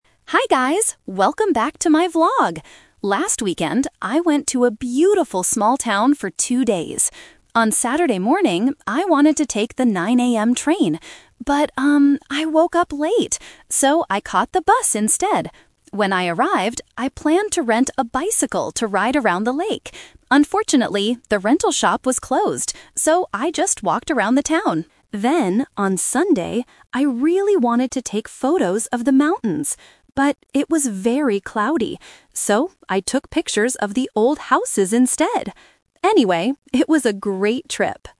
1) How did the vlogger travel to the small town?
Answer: By bus.

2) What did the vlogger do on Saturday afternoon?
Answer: She walked around the town.

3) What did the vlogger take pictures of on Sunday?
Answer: The old houses.

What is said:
Vlogger: Hi guys, welcome back to my vlog! Last weekend, I went to a beautiful small town for two days. On Saturday morning, I wanted to take the 9 AM train. But, um, I woke up late! So, I caught the bus instead. When I arrived, I planned to rent a bicycle to ride around the lake. Unfortunately, the rental shop was closed. So, I just walked around the town. Then, on Sunday, I really wanted to take photos of the mountains. But it was very cloudy. So, I took pictures of the old houses instead. Anyway, it was a great trip!

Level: A2